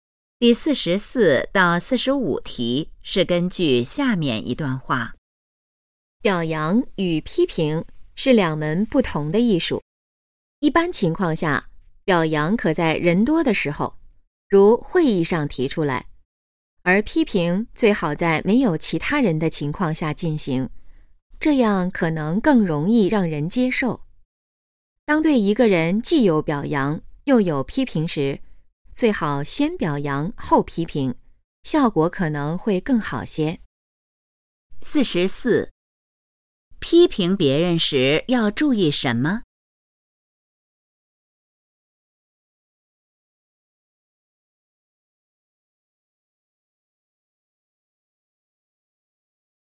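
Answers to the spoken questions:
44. 最好在没有其他人的情况下进行
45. 先表扬后批评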